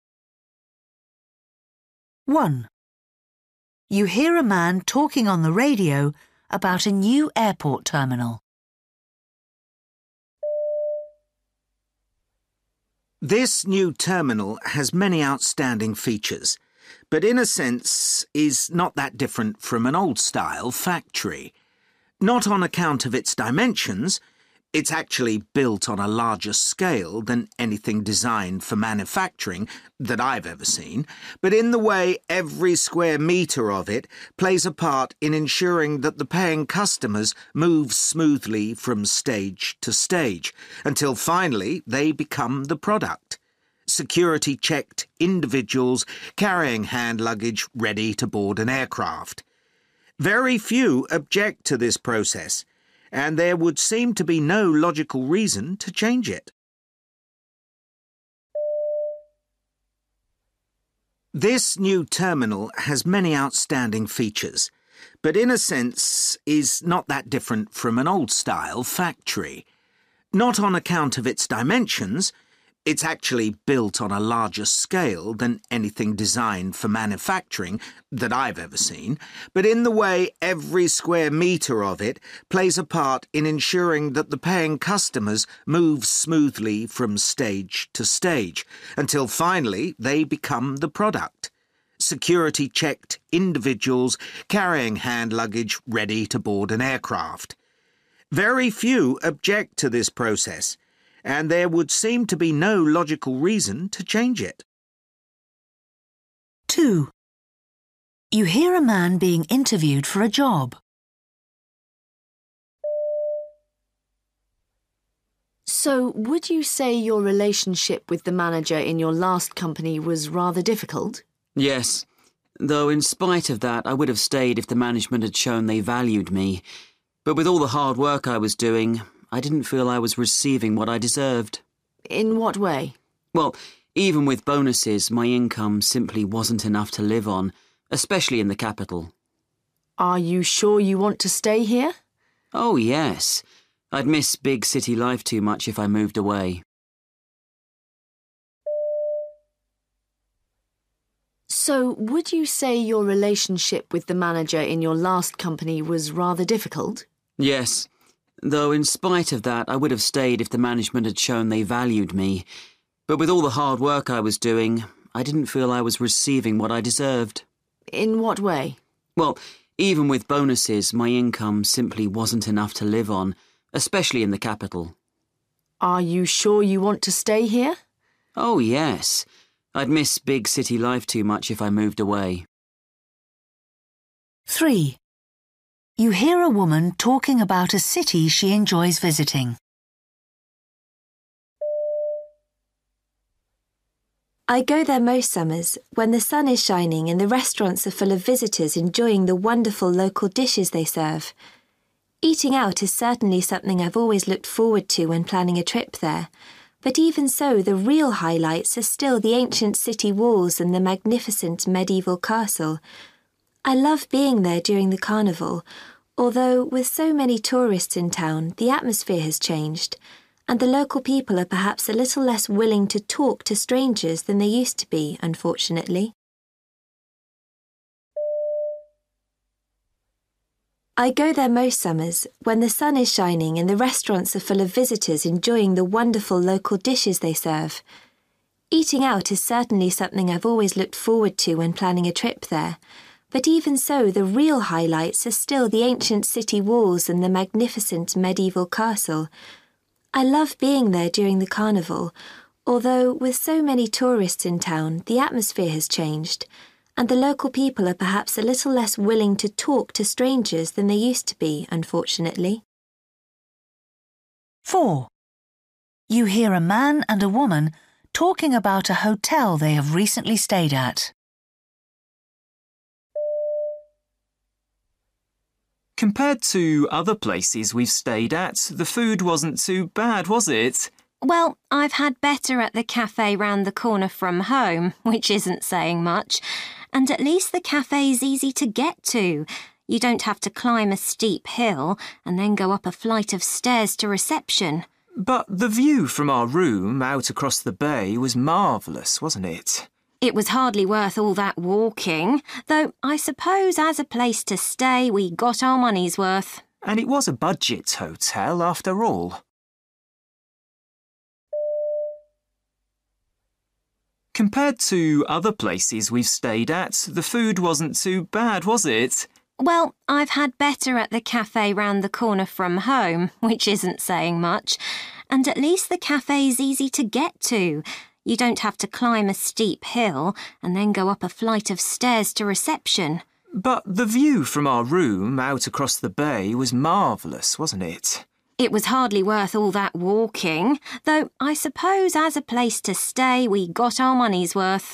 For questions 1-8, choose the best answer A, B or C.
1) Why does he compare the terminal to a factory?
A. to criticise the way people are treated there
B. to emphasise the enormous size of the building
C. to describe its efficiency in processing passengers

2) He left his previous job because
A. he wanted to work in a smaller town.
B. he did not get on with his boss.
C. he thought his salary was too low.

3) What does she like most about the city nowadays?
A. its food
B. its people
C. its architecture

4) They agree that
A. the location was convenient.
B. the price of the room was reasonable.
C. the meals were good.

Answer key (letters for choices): 1C, 2C, 3C, 4B

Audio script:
1
This new terminal has many outstanding features, but in a sense is not that different from an old-style factory. Not on account of its dimensions – it's actually built on a larger scale than anything designed for manufacturing that I've ever seen – but in the way every square metre of it plays a part in ensuring that the paying customers move smoothly from stage to stage until finally they become the product: security-checked individuals carrying hand luggage ready to board an aircraft. Very few object to this process, and there would seem to be no logical reason to change it.
2
Woman: So would you say your relationship with the manager in your last company was rather difficult?
Man: Yes, though in spite of that I would have stayed if the management had shown they valued me, but with all the hard work I was doing I didn't feel I was receiving what I deserved.
Woman: In what way?
Man: Well, even with bonuses my income simply wasn't enough to live on, especially in the capital.
Woman: Are you sure you want to stay here?
Man: Oh yes, I'd miss big-city life too much if I moved away.
3
I go there most summers, when the sun is shining and the restaurants are full of visitors enjoying the wonderful local dishes they serve. Eating out is certainly something I've always looked forward to when planning a trip there, but even so the real highlights are still the ancient city walls and the magnificent medieval castle. I love being there during the carnival, although with so many tourists in town the atmosphere has changed, and the local people are perhaps a little less willing to talk to strangers than they used to be, unfortunately.
4
Man: Compared to other places we've stayed at, the food wasn't too bad, was it?
Woman: Well, I've had better at the café round the corner from home, which isn't saying much. And at least the café's easy to get to. You don't have to climb a steep hill and then go up a flight of stairs to reception.
Man: But the view from our room out across the bay was marvellous, wasn't it?
Woman: It was hardly worth all that walking. Though I suppose as a place to stay we got our money's worth.
Man: And it was a budget hotel, after all.
5